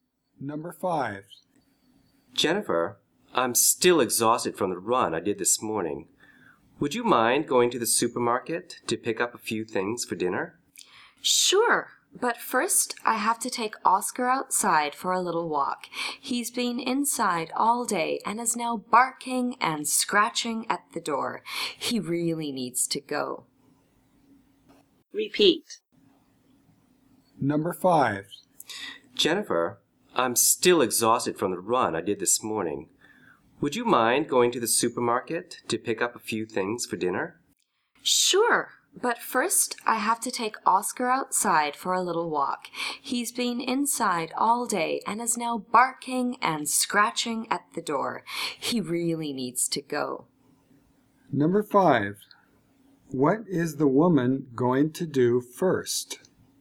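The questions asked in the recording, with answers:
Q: What is the woman going to do first?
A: Take the dog, Oscar, for a walk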